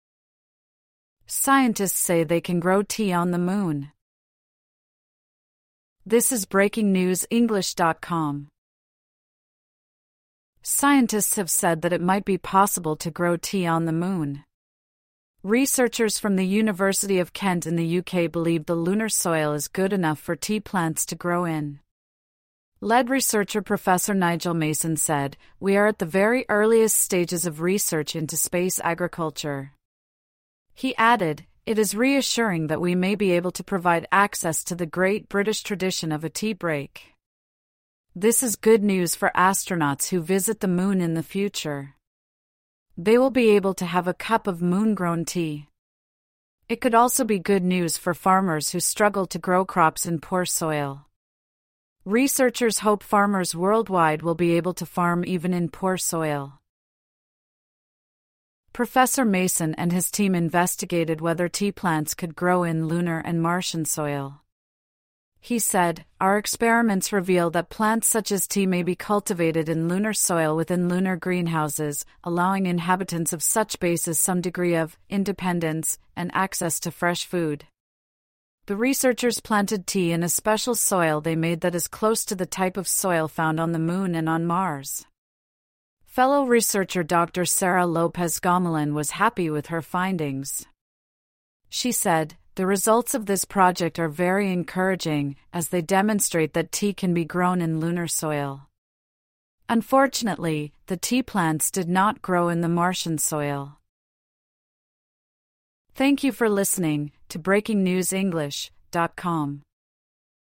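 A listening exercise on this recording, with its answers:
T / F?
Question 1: Scientists have successfully grown tea on the Moon.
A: F

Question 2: Scientists say they are just beginning to look into space farming.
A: T

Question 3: Astronauts may one day be able to have an English-style tea break.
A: T

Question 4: The research may help farmers who farm in poor soil.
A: T

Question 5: The researchers looked at growing tea on five different planets.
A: F

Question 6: There could one day be greenhouses on the Moon.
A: T

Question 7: Scientists used real soil from the Moon.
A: F

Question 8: The test tea grew well in Moon-like and Marslike soil.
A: F

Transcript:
(1/5) Scientists say they can grow tea on the Moon
Scientists have said that it might be possible to grow tea on the Moon. Researchers from the University of Kent in the UK believe the lunar soil is good enough for tea plants to grow in. 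Lead researcher Professor Nigel Mason said: "We are at the very earliest stages of research into space agriculture." He added: "It is reassuring that we may be able to provide access to the great British tradition of a tea break." This is good news for astronauts who visit the Moon in the future. They will be able to have a cup of Moon-grown tea. It could also be good news for farmers who struggle to grow crops in poor soil. Researchers hope farmers worldwide will be able to farm even in poor soil.
Professor Mason and his team investigated whether tea plants could grow in lunar and Martian soil. He said: "Our experiments reveal that...plants such as tea may be cultivated in lunar soil within lunar greenhouses, allowing inhabitants of such bases some degree of [independence] and access to fresh food." The researchers planted tea in a special soil they made that is close to the type of soil found on the Moon and on Mars. 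Fellow researcher Dr Sara Lopez-Gomollon was happy with her findings. She said: "The results of this project are very encouraging, as they demonstrate that tea...can be grown in lunar soil." Unfortunately, the tea plants did not grow in the Martian soil.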